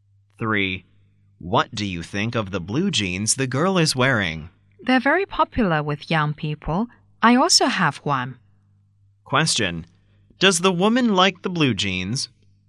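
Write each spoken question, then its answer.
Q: Does the woman like the blue jeans?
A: Yes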